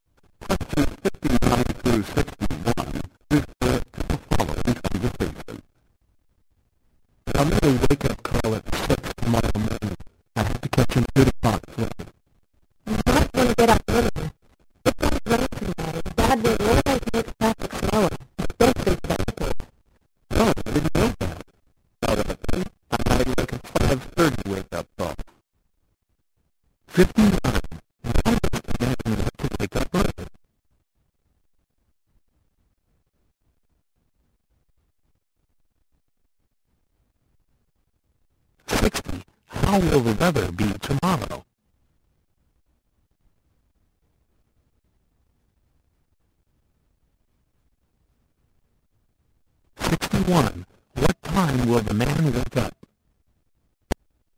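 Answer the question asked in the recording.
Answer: At 5:30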